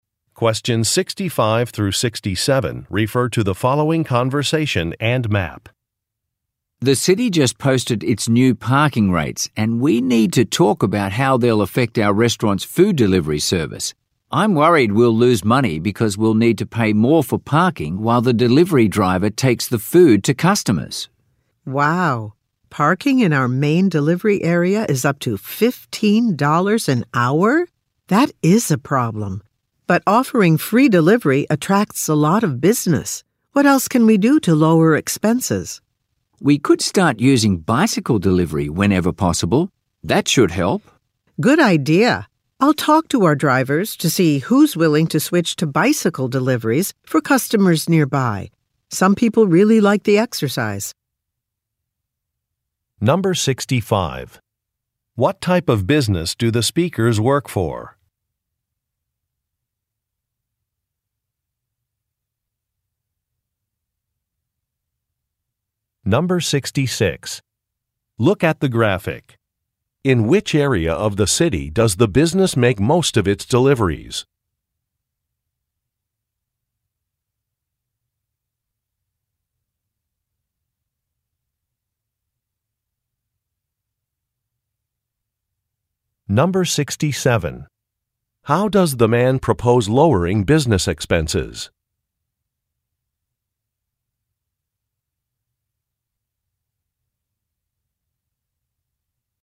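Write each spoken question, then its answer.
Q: What type of business do the speakers work for?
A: A restaurant

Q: How does the man propose lowering business expenses?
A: By using bicycle delivery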